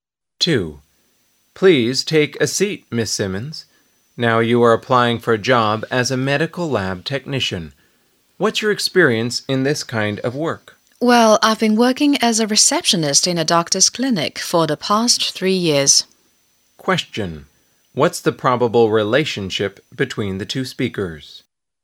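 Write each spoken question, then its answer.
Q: What's the probable relationship between the two speakers?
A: Interviewer and job applicant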